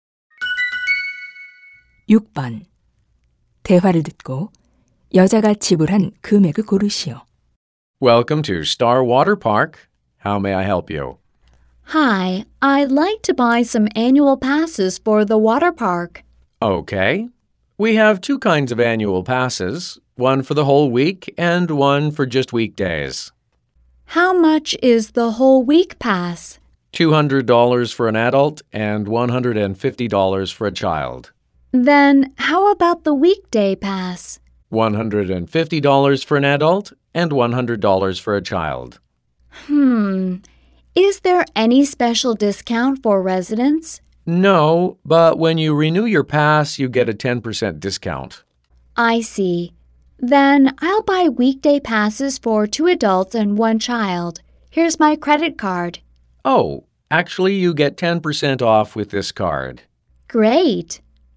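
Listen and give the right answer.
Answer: $360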